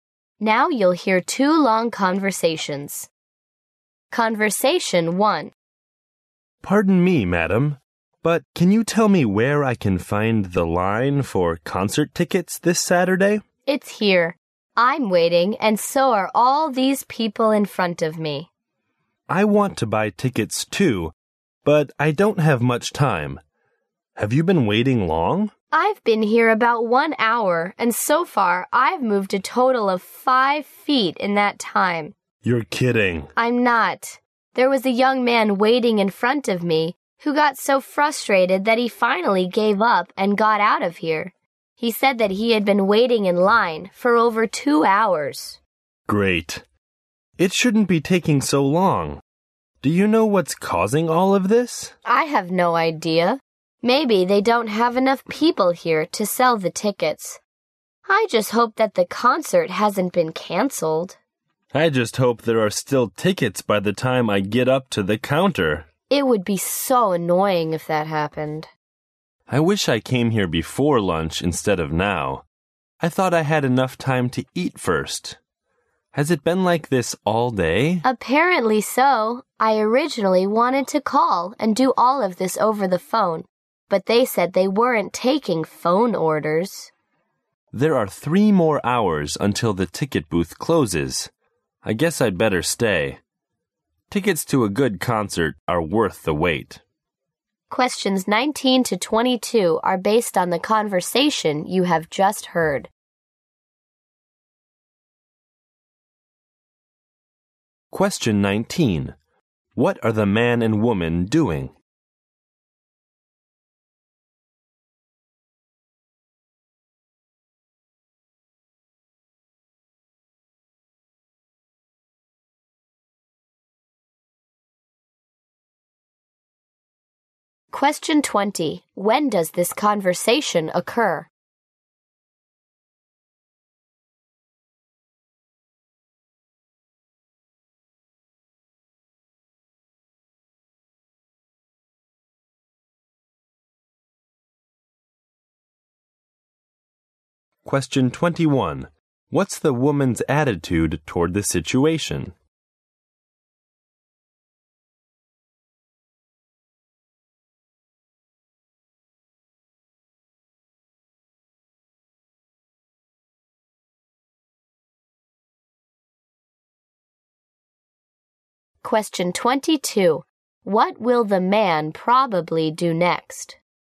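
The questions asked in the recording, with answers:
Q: What are the man and woman doing?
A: Waiting in line to buy concert tickets

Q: When does this conversation occur?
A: In the afternoon, after lunch

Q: What will the man probably do next?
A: Stay in line and wait for tickets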